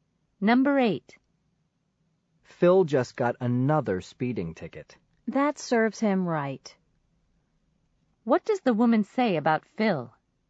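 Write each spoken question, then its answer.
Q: What does the woman say about Phil?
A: He deserved the ticket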